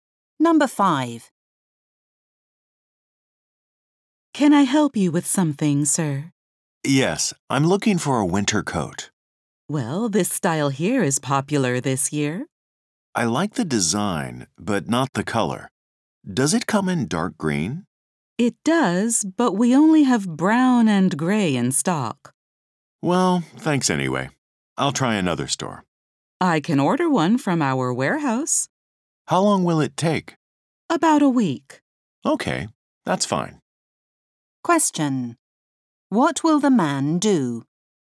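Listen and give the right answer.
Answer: Wait about a week for a dark green coat to be ordered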